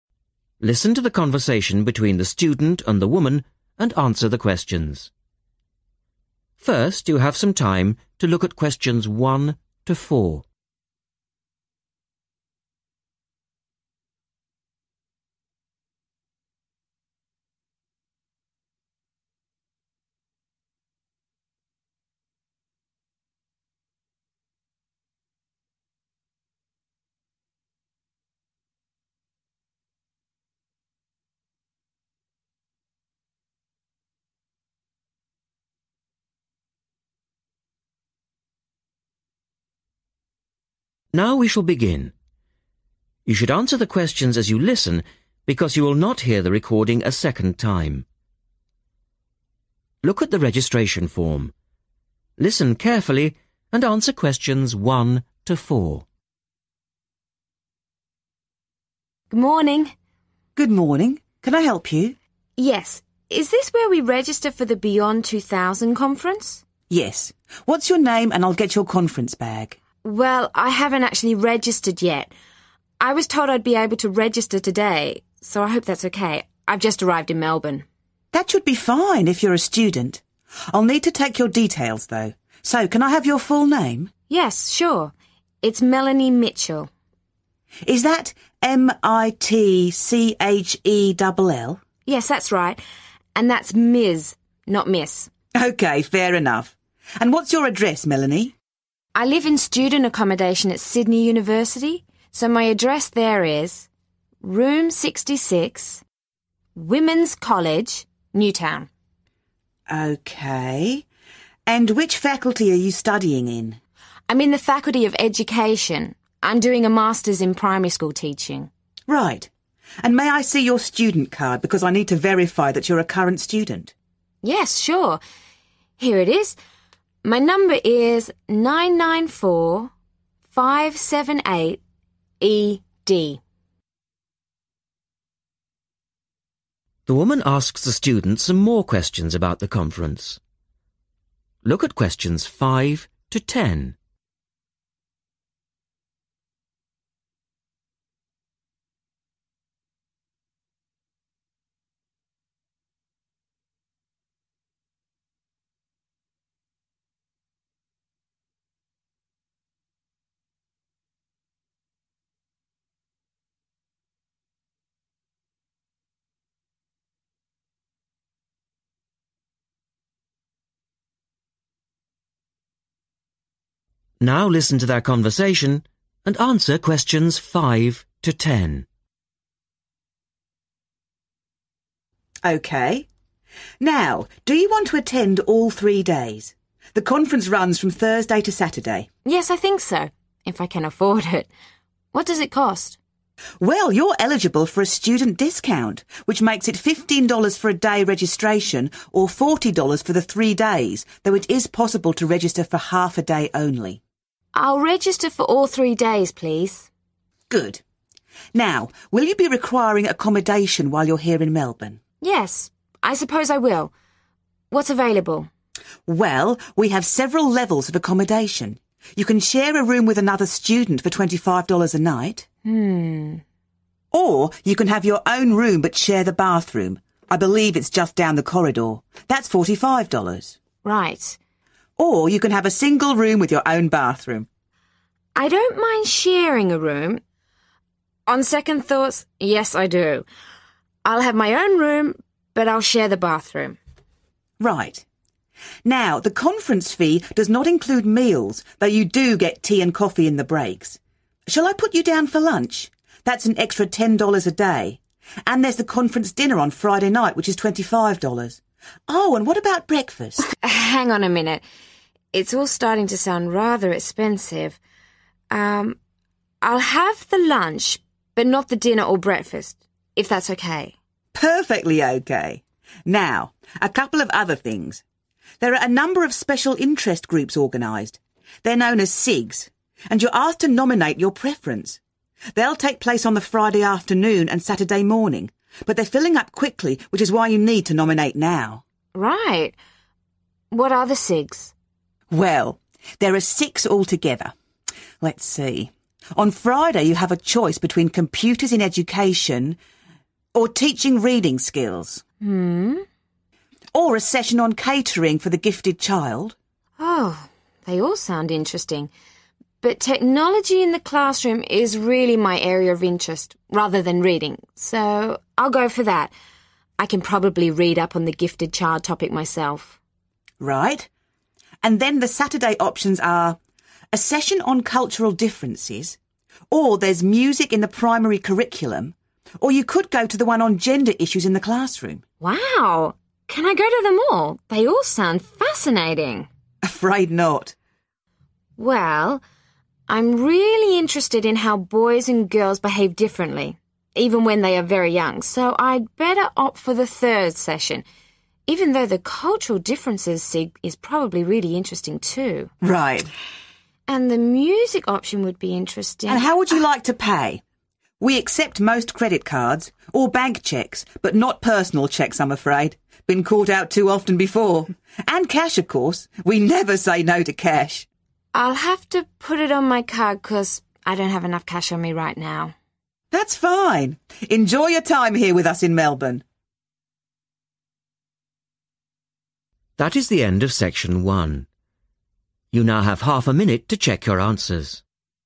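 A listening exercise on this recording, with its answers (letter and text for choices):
Complete the form. Write NO MORE THAN THREE WORDS AND/OR A NUMBER for each answer.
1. Name: Melanie Ms 1................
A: Mitchell

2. Address: Room 2...............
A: 66, Women's College, Newtown

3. Faculty: 3................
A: Education

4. Student No: 4.................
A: 994-578-ED

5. Registration for:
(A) Half day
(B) Full day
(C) Full conference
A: (C) Full conference

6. Accommodation required:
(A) Share room/share bathroom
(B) Own room/share bathroom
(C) Own room with bathroom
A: (B) Own room/share bathroom

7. Meals required:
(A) Breakfast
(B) Lunch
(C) Dinner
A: (B) Lunch

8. Friday SIGs:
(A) Computers in Education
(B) Teaching Reading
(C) The Gifted Child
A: (A) Computers in Education

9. Saturday SIGs:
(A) Cultural Differences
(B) Music in the Curriculum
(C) Gender Issues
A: (C) Gender Issues

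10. Method of payment:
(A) Credit card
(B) Cheque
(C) Cash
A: (A) Credit card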